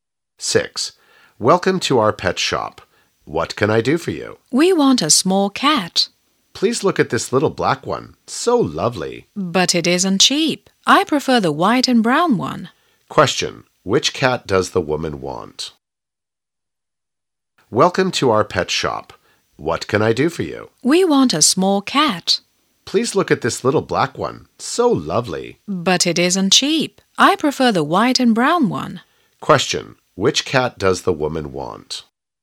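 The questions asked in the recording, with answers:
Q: Which cat does the woman want?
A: The white and brown one.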